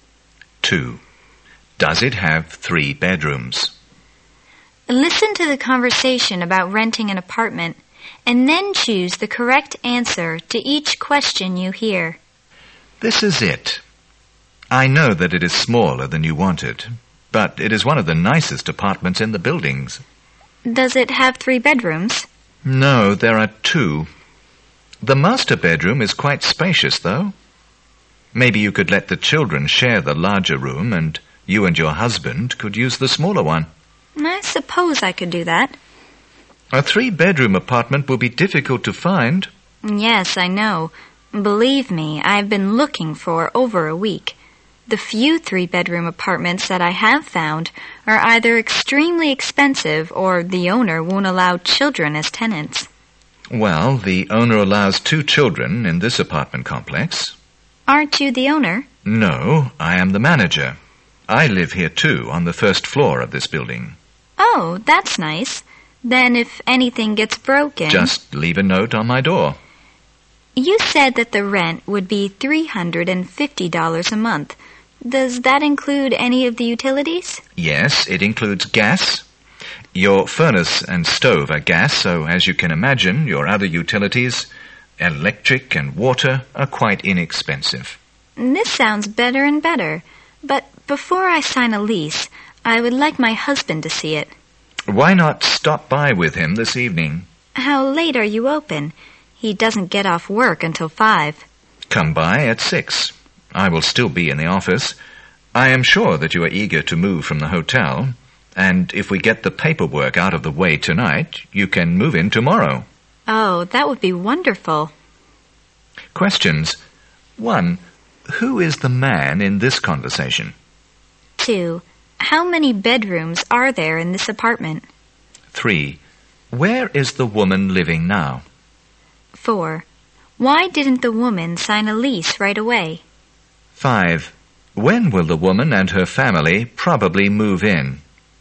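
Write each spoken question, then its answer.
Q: Who is the man in this conversation?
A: The manager of the apartment building

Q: How many bedrooms are there in this apartment?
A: Two

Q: Where is the woman living now?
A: In a hotel

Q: Why didn't the woman sign a lease right away?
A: She wants her husband to see the apartment first

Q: When will the woman and her family probably move in?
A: Tomorrow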